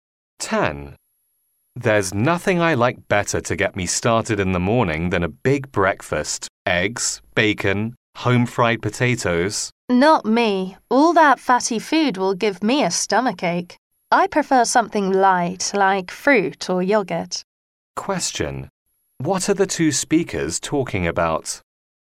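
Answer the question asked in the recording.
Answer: What they like for breakfast.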